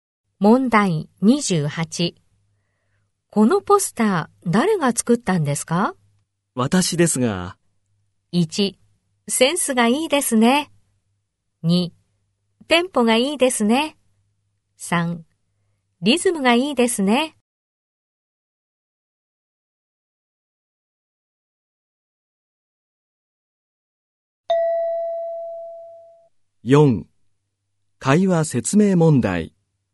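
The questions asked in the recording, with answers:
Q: このポスター誰が作ったんですか?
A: 1: センスがいいですね。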